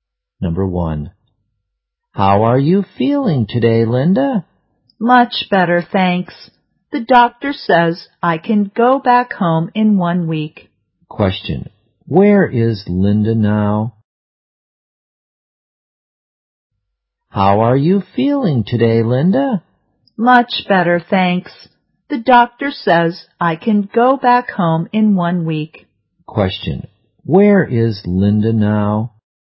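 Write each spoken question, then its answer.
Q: Where is Linda now?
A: In hospital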